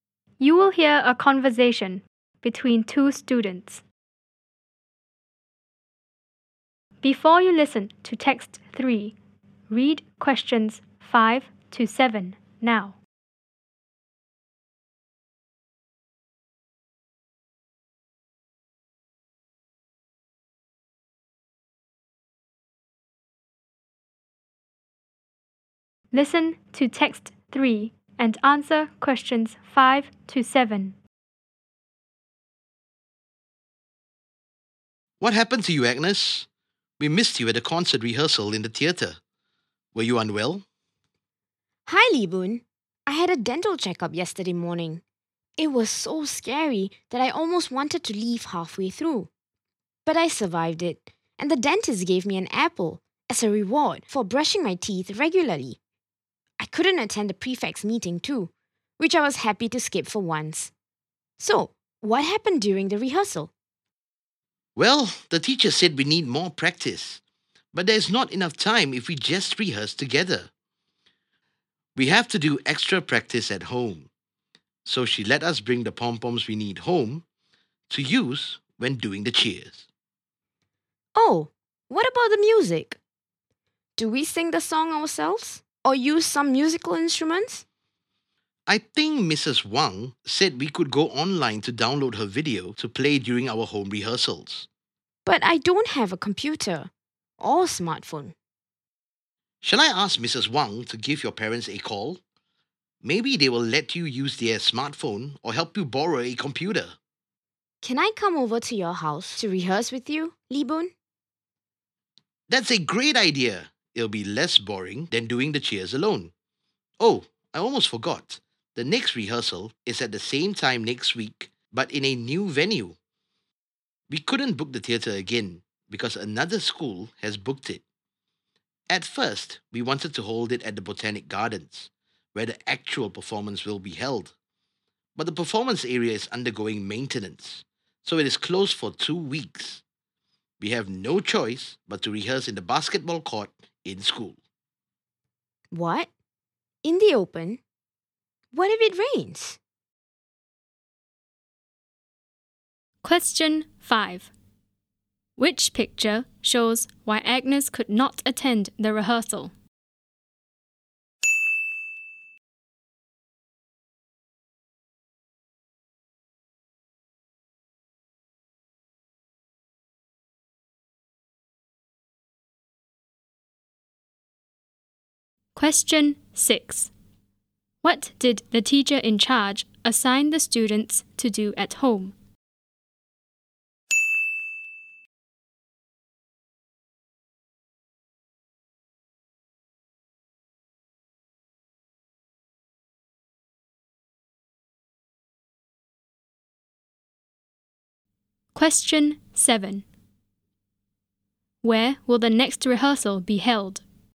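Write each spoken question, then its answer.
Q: What did the teacher in charge assign the students to do at home?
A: Do extra practice of the cheers at home with pom-poms

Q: Where will the next rehearsal be held?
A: In the basketball court in school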